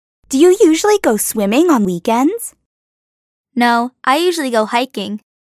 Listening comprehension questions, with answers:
Does Kitty goes swimming on weekends?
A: No, she usually goes hiking.